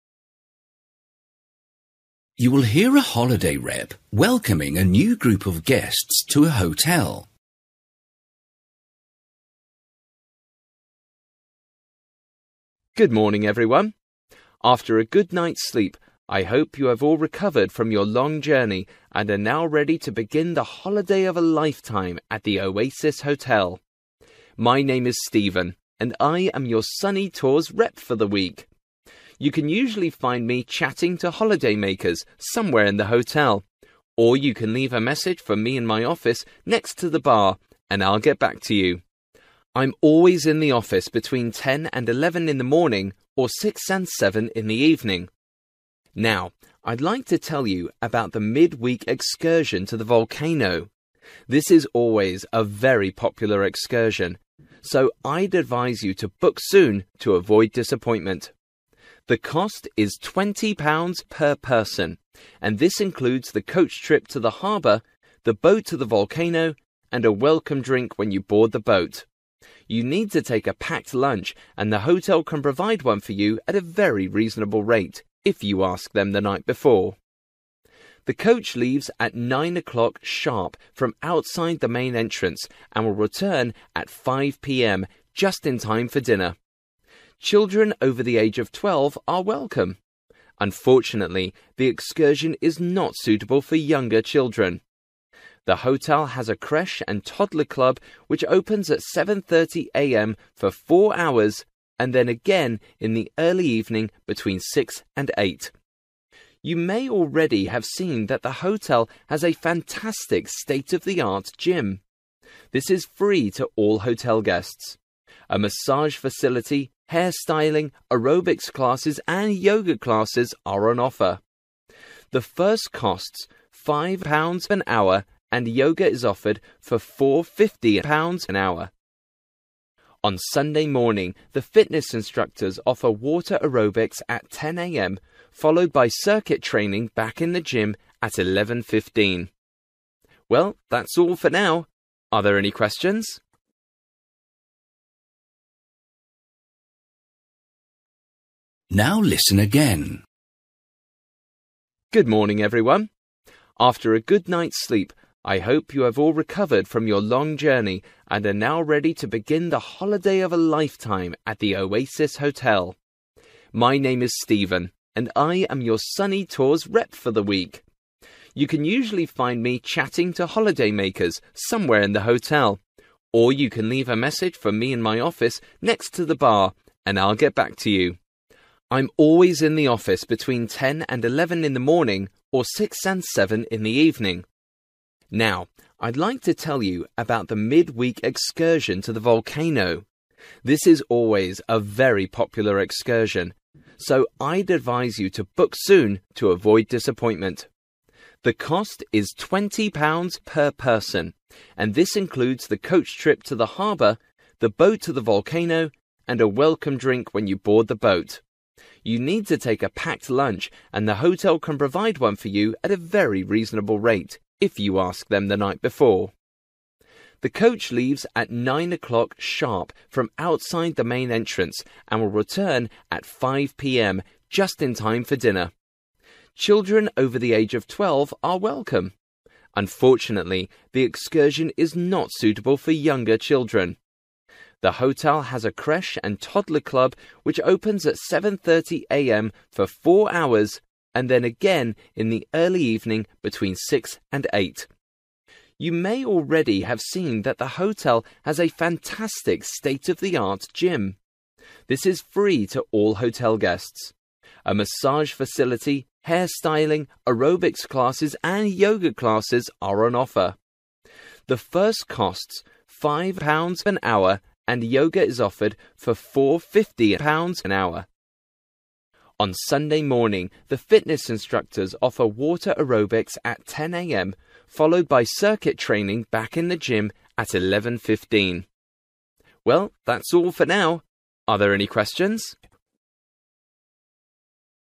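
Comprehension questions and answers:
For each question, write the correct answer in the gap. Write one or two words or a number or a date or a time. You will hear a holiday rep welcoming a new group of guests to a hotel.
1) available in his (1) between 10 and 11 am, or between 6 and 7 pm.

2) everything included except (2) .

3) anyone, but not children under the age of (3) .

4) Opening hours: 7.30 am to (4) am.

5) Cost: £ (5) an hour.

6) (6) class: in the pool on Sunday at 10 o'clock.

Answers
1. office
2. lunch
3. 12
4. 11.30
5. 4.50
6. water aerobics

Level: Luyện nghe trình độ B1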